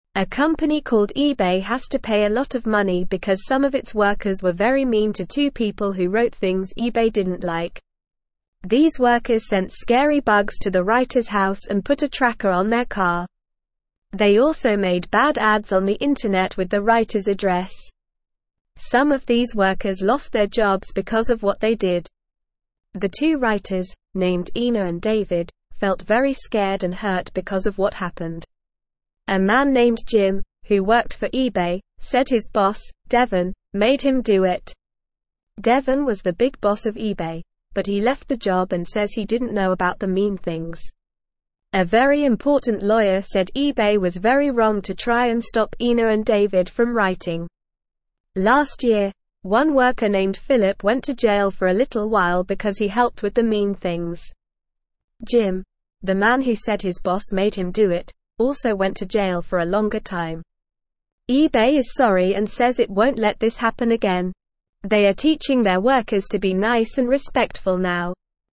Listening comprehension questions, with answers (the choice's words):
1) What happened to Devin?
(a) He went to jail.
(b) He got a promotion.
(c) He apologized to Ina and David.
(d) He left the job.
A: He left the job.

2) Why did Philip go to jail?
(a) Because he wrote bad ads on the internet.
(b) Because he helped with the mean things.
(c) Because he lost his job.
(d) Because he didn't like Ina and David.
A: Because he helped with the mean things.

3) What did eBay say they won't let happen again?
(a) They won't let their workers be mean and disrespectful.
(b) They won't let Ina and David write things they don't like.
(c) They won't let their workers lose their jobs.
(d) They won't let scary bugs be sent to their house.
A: They won't let their workers be mean and disrespectful.

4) What are eBay teaching their workers now?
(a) To be mean and disrespectful.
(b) To write bad ads on the internet.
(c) To be nice and respectful.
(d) To send scary bugs to people's houses.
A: To be nice and respectful.

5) How did Ina and David feel because of what happened?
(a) Scared and hurt.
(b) Happy and excited.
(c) Angry and mean.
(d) Bored and tired.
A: Scared and hurt.

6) A company (1)______ eBay has to pay a lot of money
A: called

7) some of its workers were very (2)______ to two people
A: mean

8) two people who wrote (3)______ eBay didn't like.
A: things

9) Some of these (4)______ lost their jobs because of what they did.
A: workers

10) felt very scared and (5)______ because of what happened.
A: hurt

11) said his boss, Devin, (6)______ him do it.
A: made

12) Devin was the big (7)______ of eBay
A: boss

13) A very (8)______ lawyer (9)______ eBay was very wrong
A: important

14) A very (8)______ lawyer (9)______ eBay was very wrong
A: said

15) because he (10)______ with the mean things.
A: helped

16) says it won't let this (11)______ again.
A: happen

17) teaching their workers to be (12)______ and respectful now.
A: nice

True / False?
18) eBay is unapologetic and makes no promises that it won't let this happen again. They are teaching their workers to be mean and disrespectful now.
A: False

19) All of the workers gained job promotions because of what they did.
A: False

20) Jim, who worked for eBay, said his boss Devin made him do it.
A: True

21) Devin was the big boss of eBay, but he left the job and says he didn't know about the mean things.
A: True

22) The workers also made bad ads on the internet with the writers' address.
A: True

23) The two writers, Ina and David, felt calm and healed because of what happened.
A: False

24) The workers sent adorable bugs to the writers' house and put a gift on their car.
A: False

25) Why did some of the workers lose their jobs?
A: Some of the workers lost their jobs because they did mean things to the writers.

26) How did Ina and David feel about what happened?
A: Ina and David felt scared and hurt because of what happened.

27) Who said eBay was wrong for trying to stop Ina and David from writing?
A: A very important lawyer said eBay was wrong for trying to stop Ina and David from writing.

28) What is eBay doing now to make sure this doesn't happen again?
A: eBay is teaching their workers to be nice and respectful now to make sure this doesn't happen again.

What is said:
A company called eBay has to pay a lot of money because some of its workers were very mean to two people who wrote things eBay didn't like. These workers sent scary bugs to the writers' house and put a tracker on their car. They also made bad ads on the internet with the writers' address. Some of these workers lost their jobs because of what they did.
The two writers, named Ina and David, felt very scared and hurt because of what happened. A man named Jim, who worked for eBay, said his boss, Devin, made him do it. A very important lawyer said eBay was very wrong to try and stop Ina and David from writing.
Last year, one worker named Philip went to jail for a little while because he helped with the mean things. Jim, the man who said his boss made him do it, also went to jail for a longer time. eBay is sorry and says it won't let this happen again. They are teaching their workers to be nice and respectful now.

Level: Level 2